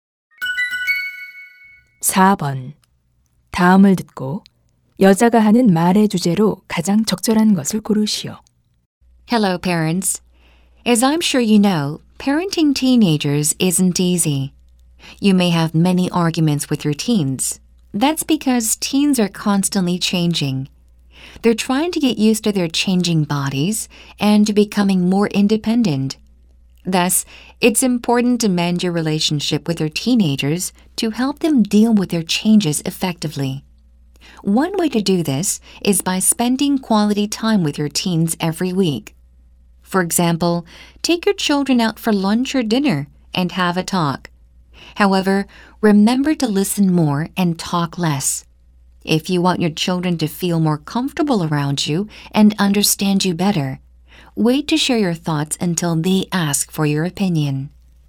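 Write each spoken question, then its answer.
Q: 다음을 듣고 여자가 하는 말의 주제로 가장 적절한 것을 고르시오.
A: 십대 자녀와 매주 좋은 시간을 보내며 관계를 개선하는 방법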